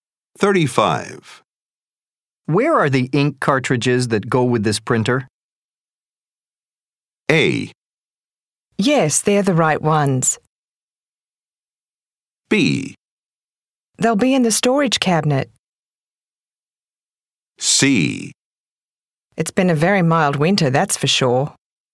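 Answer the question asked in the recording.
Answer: B: They'll be in the storage cabinet.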